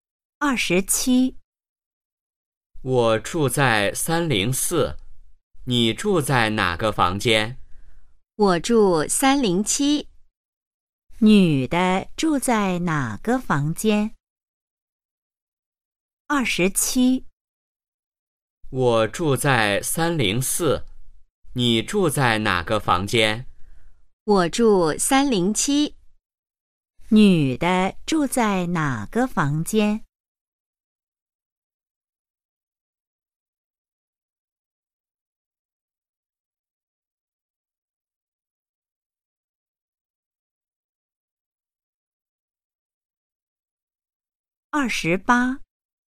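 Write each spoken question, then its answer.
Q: 女的住在哪个房间?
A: 307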